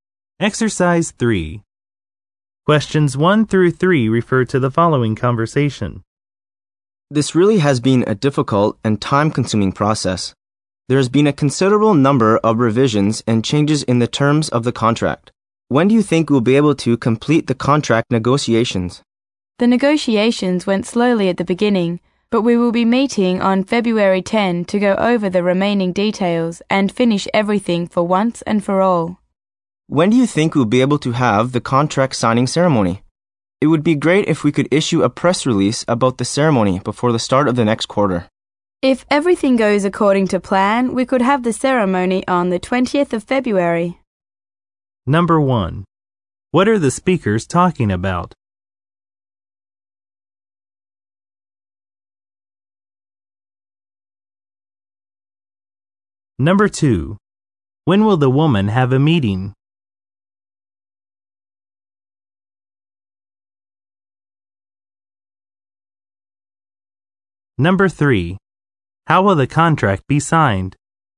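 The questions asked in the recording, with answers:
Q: What are the speakers talking about?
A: Contract negotiations

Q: When will the woman have a meeting?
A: February 10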